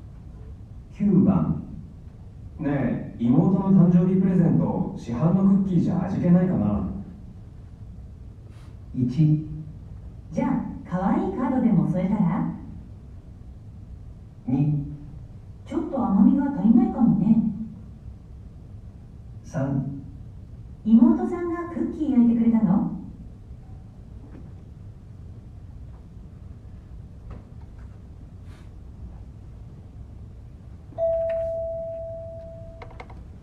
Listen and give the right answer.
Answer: 1

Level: N1 Listening · Test 2